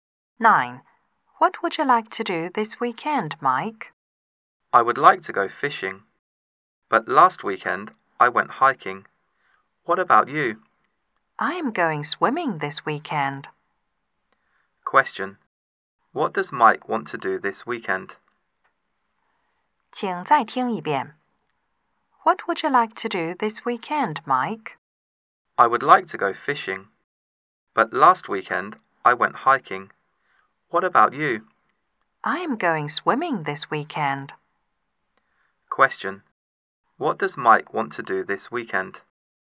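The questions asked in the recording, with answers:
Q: Question.What does Mike want to do this weekend?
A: Go fishing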